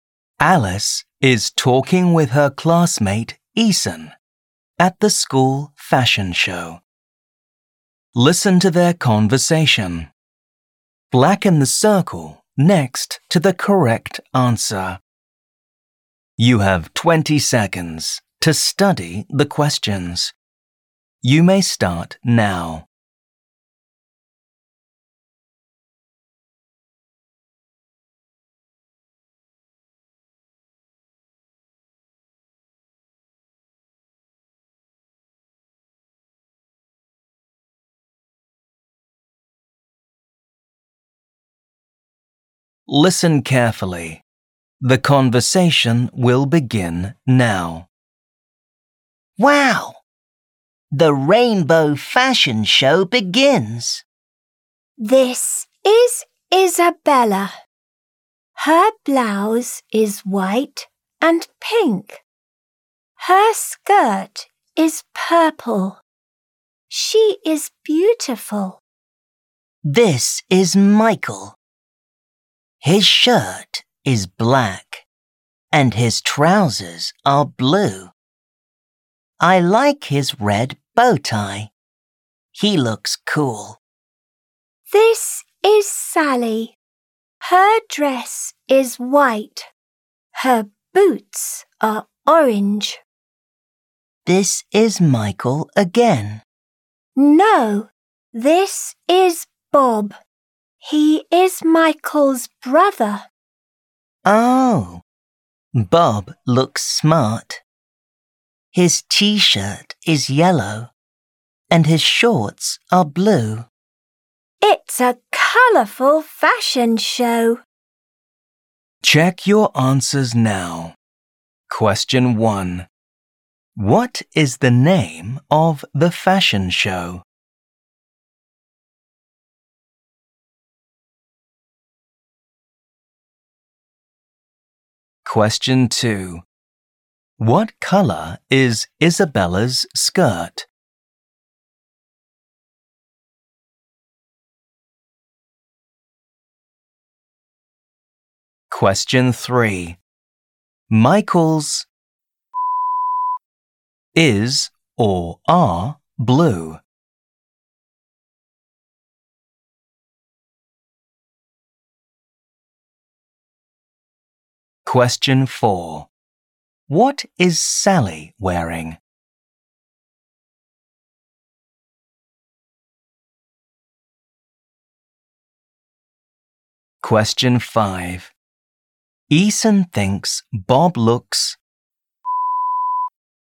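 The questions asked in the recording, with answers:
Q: What is the name of the fashion show?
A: the rainbow fashion show

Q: What colour is Isabella's skirt?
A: purple

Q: Michael's is or are blue?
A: trousers

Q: What is Sally wearing?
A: a white dress and orange boots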